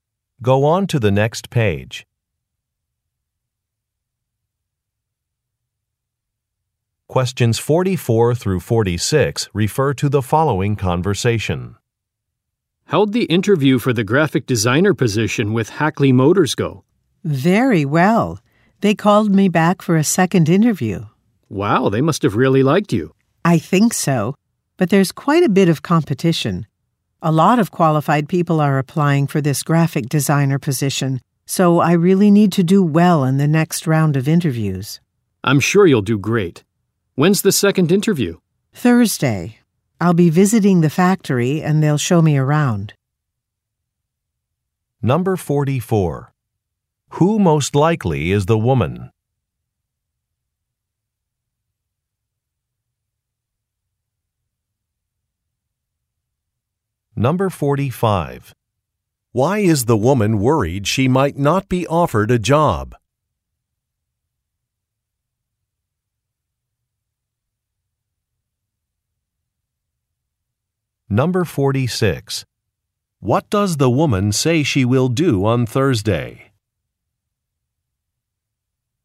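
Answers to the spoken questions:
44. A job applicant for a graphic designer position
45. Many qualified people are applying for the position
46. Visit the factory for a second interview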